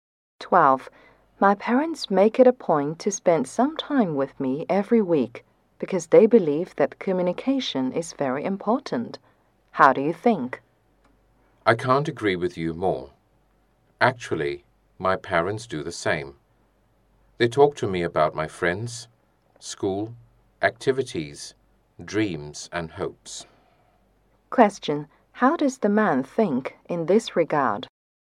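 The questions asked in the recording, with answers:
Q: How does the man think in this regard?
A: He fully agrees; his parents do the same.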